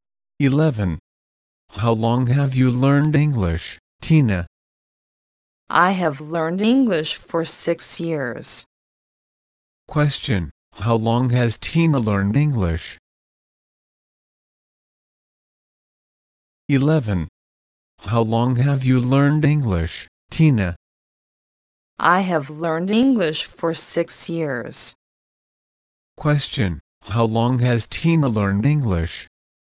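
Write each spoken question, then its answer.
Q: How long has Tina learned English?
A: For 6 years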